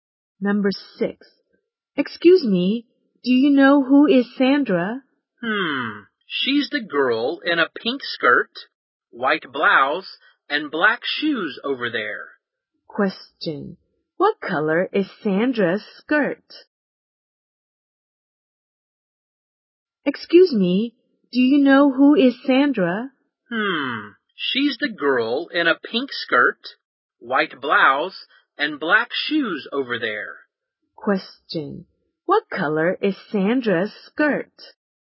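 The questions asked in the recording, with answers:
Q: What color is Sandra's skirt?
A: Pink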